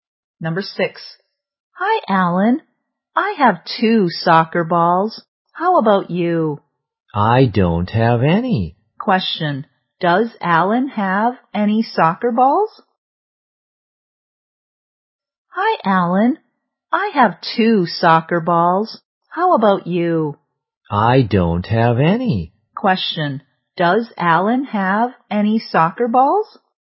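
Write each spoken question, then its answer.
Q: Question. Does Alan have any soccer balls?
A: No, he doesn't.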